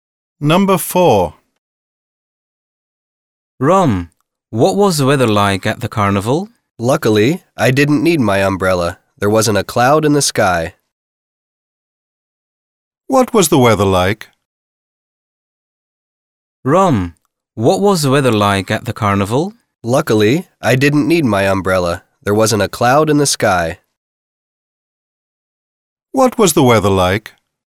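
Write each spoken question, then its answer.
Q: What was the weather like?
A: sunny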